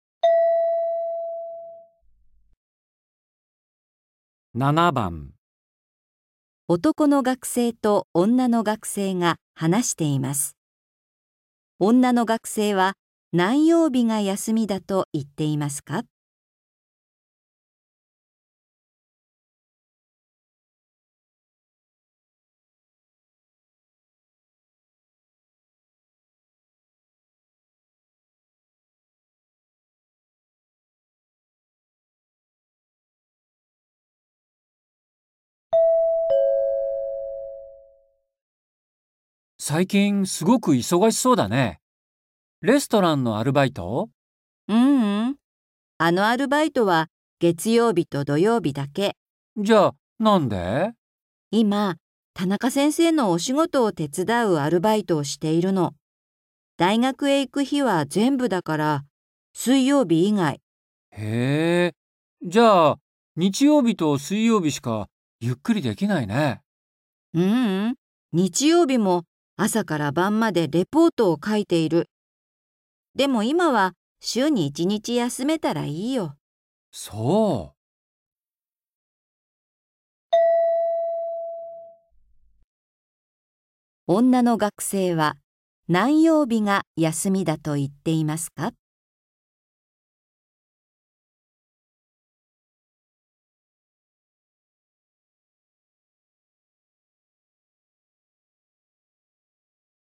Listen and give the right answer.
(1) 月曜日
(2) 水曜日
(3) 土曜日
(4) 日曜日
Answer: (2) 水曜日

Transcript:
M:最近、すごく忙しそうだね。レストランのアルバイト?
F:ううん。あのアルバイトは月曜日と土曜日だけ。
M:じゃ、なんで?
F:今、田中先生のお仕事を手伝うアルバイトをしている。大学へ行く日は全部だから、水曜日以外。
M:へー。じゃあ、日曜日と水曜日しかゆっくりできないね。
F:ううん。日曜日も朝から晩までレポートを書いている。でも、今は週に1日休めたら、いいよ。
M:そう。
女の学生は、何曜日が休みだと言っていますか。

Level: N4